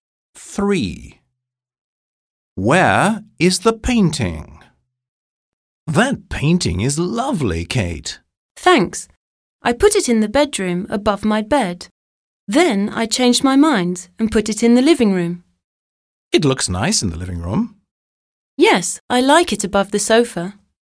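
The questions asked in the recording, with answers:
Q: Where is the painting?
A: In the living room, above the sofa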